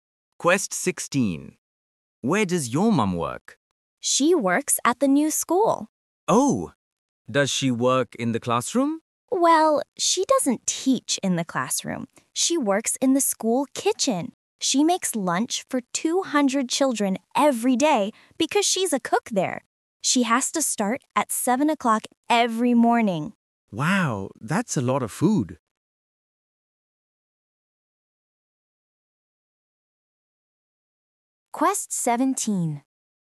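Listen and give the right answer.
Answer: In the school kitchen (at the new school)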